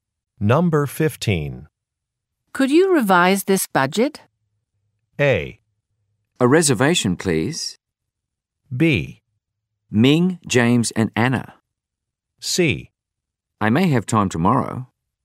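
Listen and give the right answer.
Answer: C: I may have time tomorrow.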